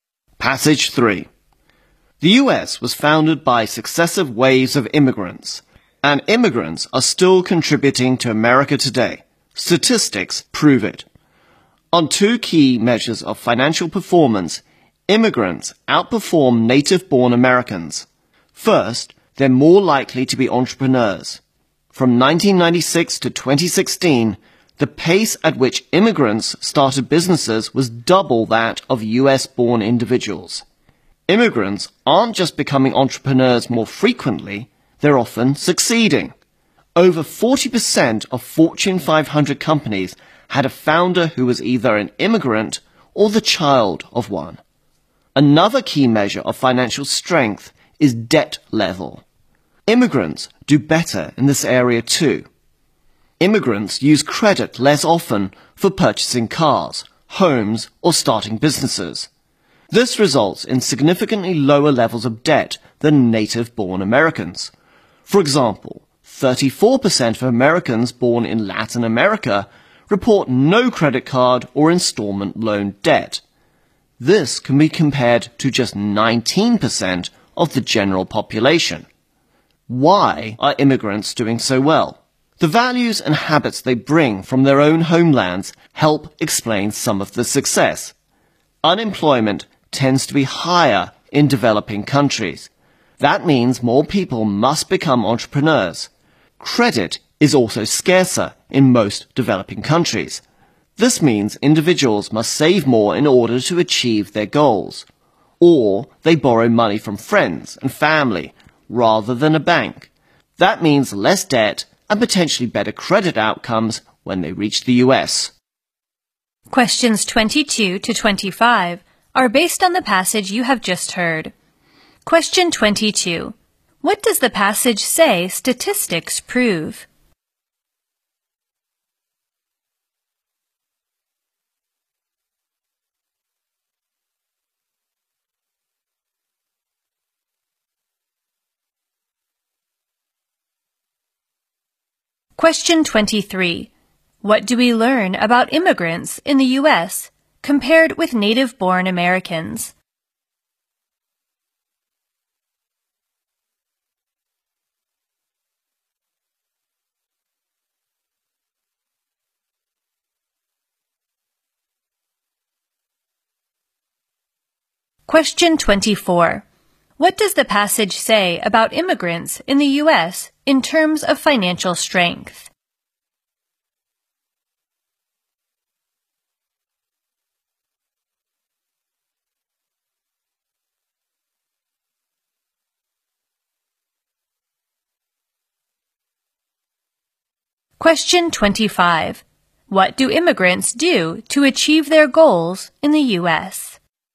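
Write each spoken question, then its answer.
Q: What does the passage say statistics prove?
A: Immigrants are still contributing to America.

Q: What do we learn about immigrants in the U.S.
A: They are more likely to be entrepreneurs.

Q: What does the passage say about immigrants in the U.S.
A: They have lower levels of debt.

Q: What do immigrants do to achieve their goals in the U.S.?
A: Save more or borrow from friends and family.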